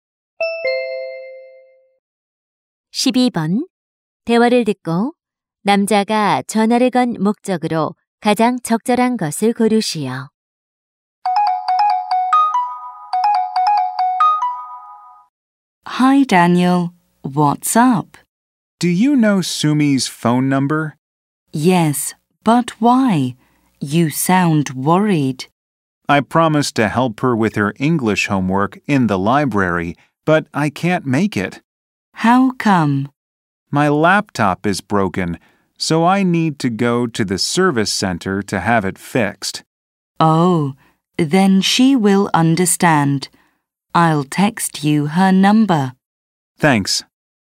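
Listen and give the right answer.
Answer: 수미의 전화번호를 물어보려고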